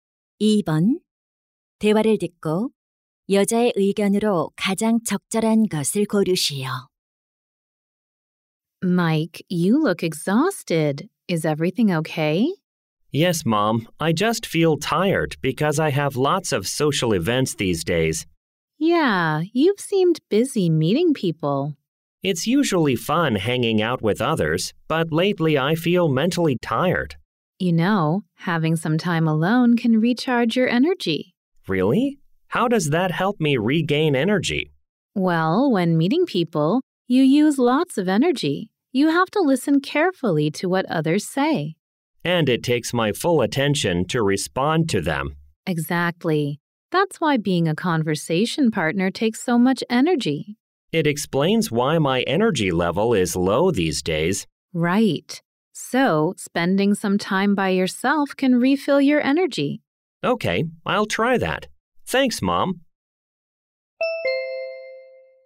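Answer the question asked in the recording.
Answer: 혼자만의 시간을 보내는 것은 에너지를 재충전해 준다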